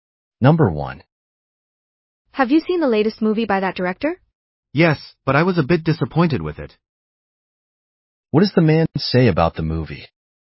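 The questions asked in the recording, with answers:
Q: What does the man say about the movie?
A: He was a bit disappointed with it.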